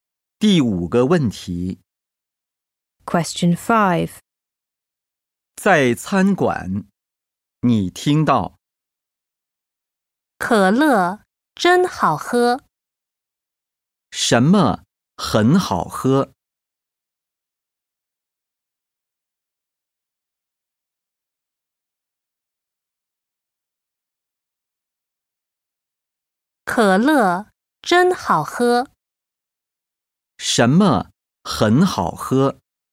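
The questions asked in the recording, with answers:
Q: 什么很好喝?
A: 可乐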